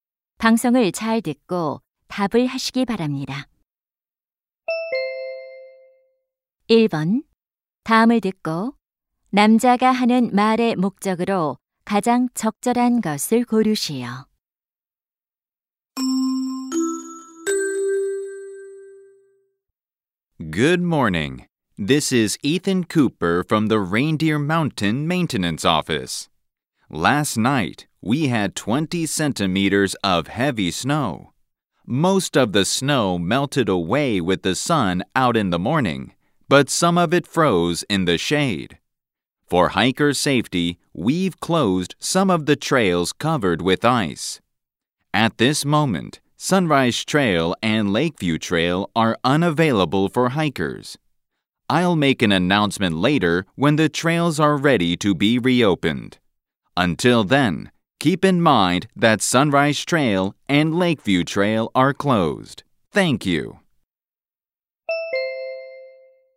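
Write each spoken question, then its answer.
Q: 다음을 듣고 남자가 하는 말의 목적으로 가장 적절한 것을 고르시오.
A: 빙판으로 인한 등산로(Sunrise Trail, Lakeview Trail) 폐쇄를 알리려고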